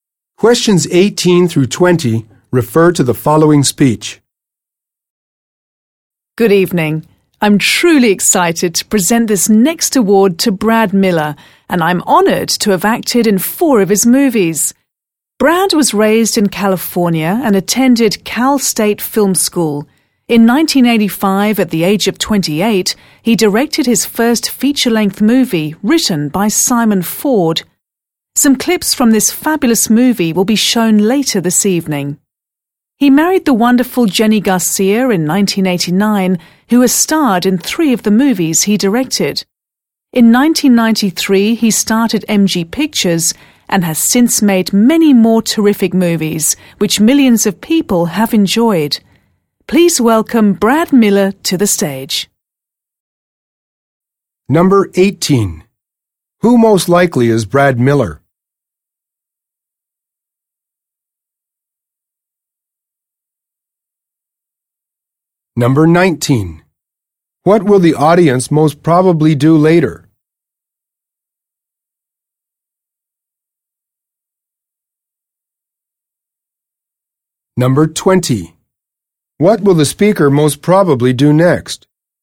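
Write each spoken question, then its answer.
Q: Who most likely is Brad Miller?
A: A movie director

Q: What will the audience most probably do later?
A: Watch clips from his first movie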